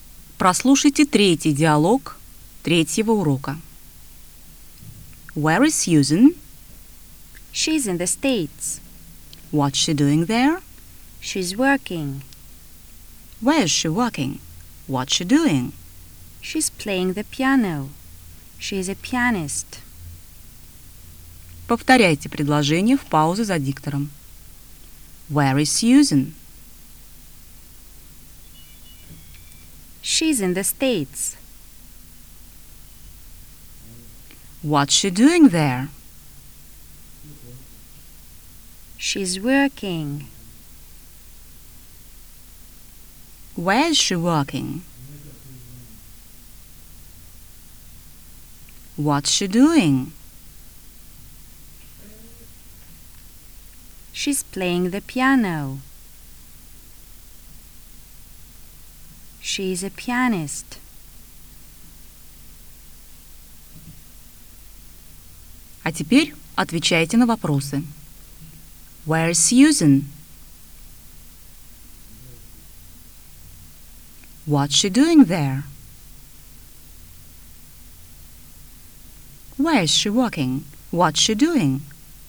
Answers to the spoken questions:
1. She's in the States.
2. She's working.
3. She's playing the piano. She's the pianist.